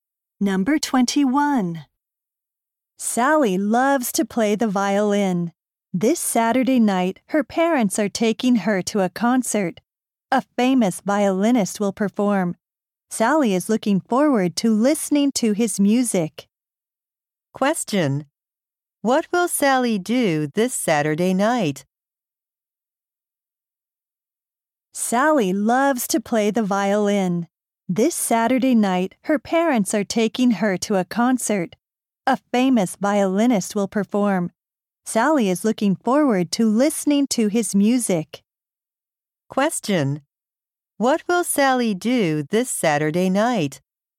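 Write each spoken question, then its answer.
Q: What will Sally do this Saturday night?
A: Go to a concert.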